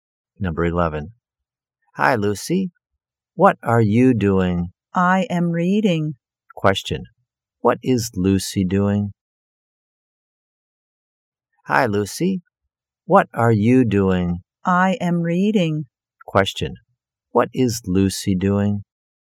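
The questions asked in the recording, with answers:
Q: What is Lucy doing?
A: She is reading.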